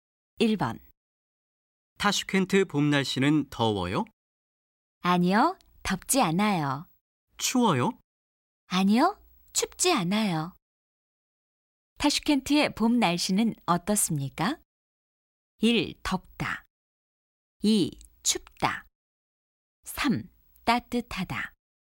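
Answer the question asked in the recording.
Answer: 3: 따뜻하다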